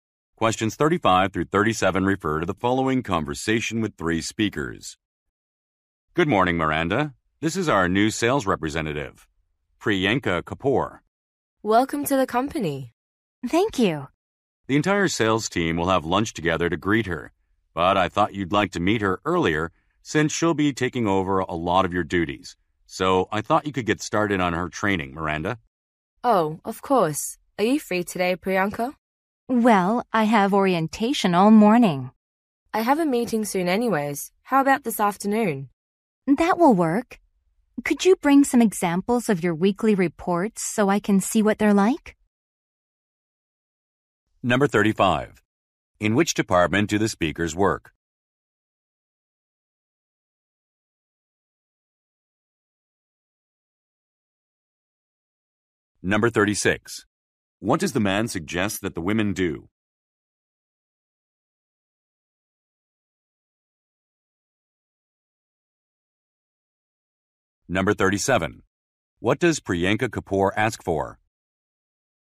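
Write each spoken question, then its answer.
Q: In which department do the speakers work?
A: Sales

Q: What does the man suggest that the women do?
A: Start Priyanka's training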